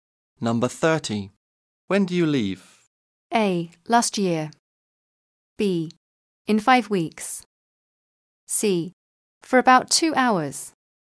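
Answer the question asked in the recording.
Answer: B: In 5 weeks.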